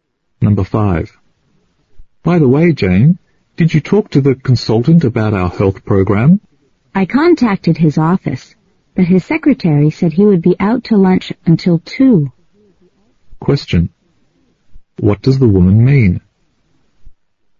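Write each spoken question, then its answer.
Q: What does the woman mean?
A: She hasn't talked to the consultant yet, because he is out to lunch until 2.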